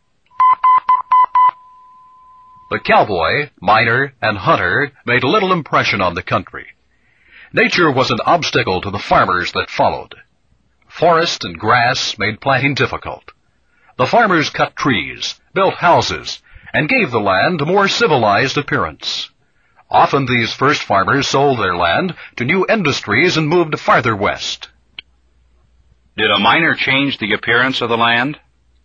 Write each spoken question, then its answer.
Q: Did a miner change the appearance of the land?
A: No, he didn't. No, the miner did not change the appearance of the land.